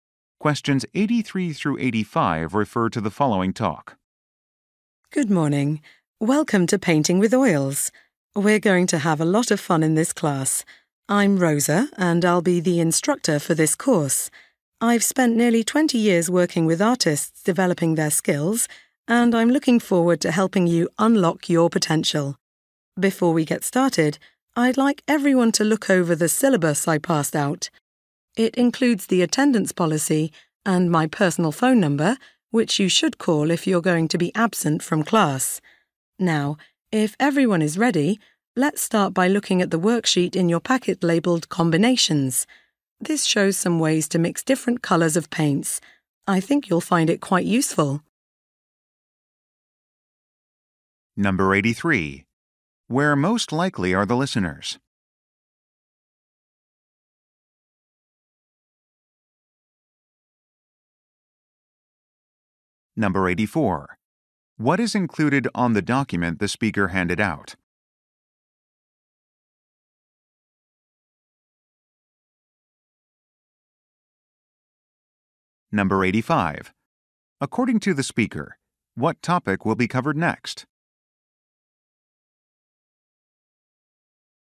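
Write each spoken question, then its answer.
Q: Where most likely are the listeners?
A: In an oil painting class

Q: What is included on the document the speaker handed out?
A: The attendance policy and her phone number

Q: According to the speaker, what topic will be covered next?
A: Mixing paint colors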